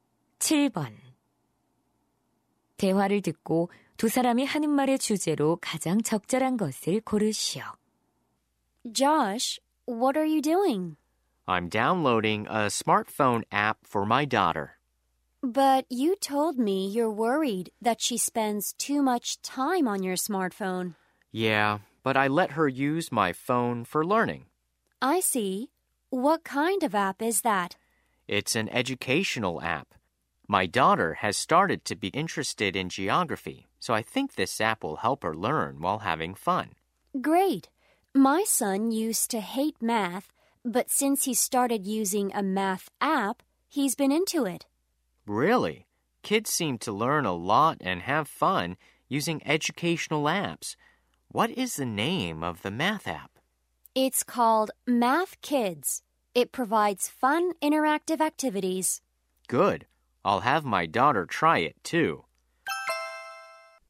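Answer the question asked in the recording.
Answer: 교육용 앱이 아이들 학습에 주는 이점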